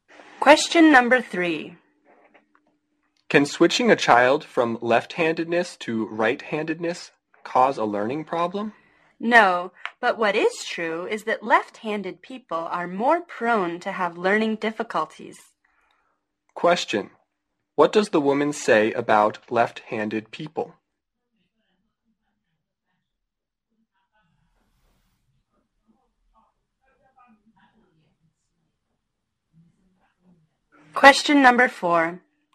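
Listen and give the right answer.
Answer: They are more prone to have learning difficulties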